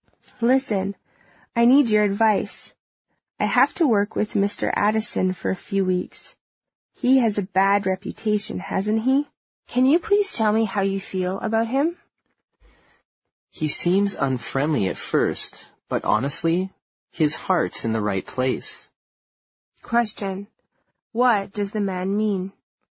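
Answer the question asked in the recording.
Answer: Mr. Addison seems unfriendly at first, but he is actually a good, kind person.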